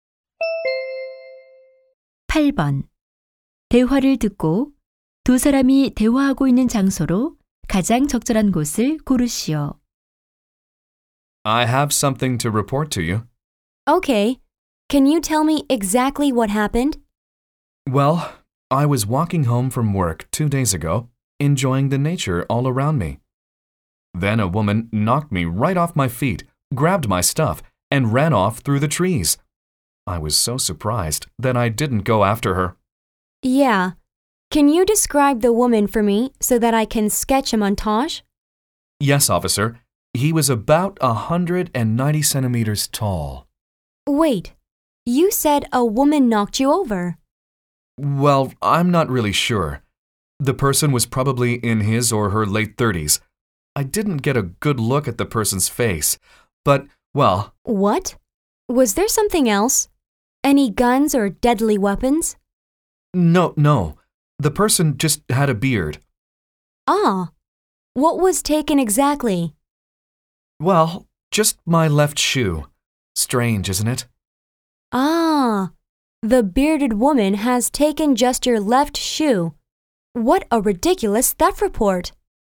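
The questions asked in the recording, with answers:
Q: 두 사람이 대화하고 있는 장소로 가장 적절한 곳을 고르시오.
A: 경찰서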